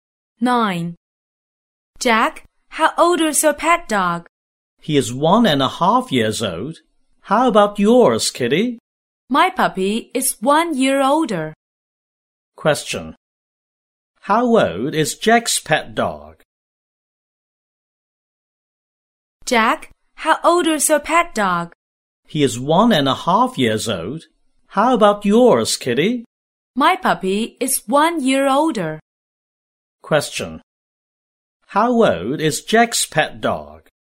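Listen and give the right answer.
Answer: 1.5 years old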